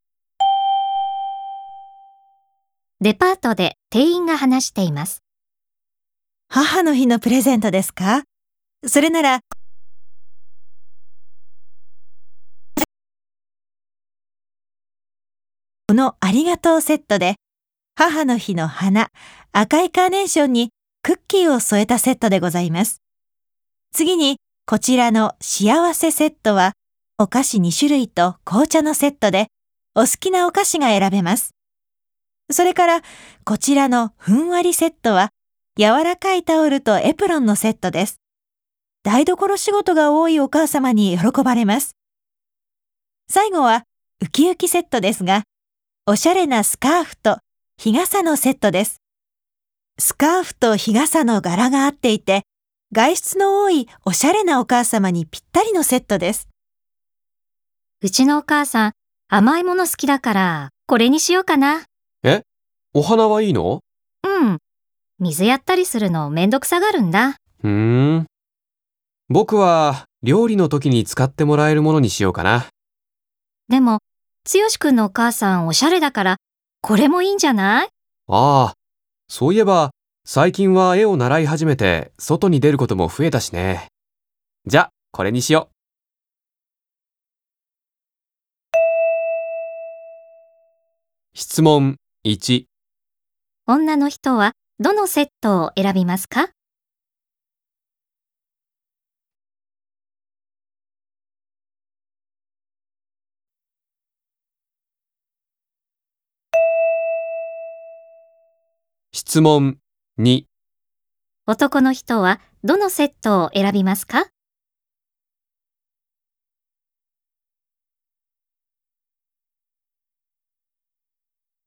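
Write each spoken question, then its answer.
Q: 女の人はどのセットを選びますか?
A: 幸せセット

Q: 男の人はどのセットを選びますか?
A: ウキウキセット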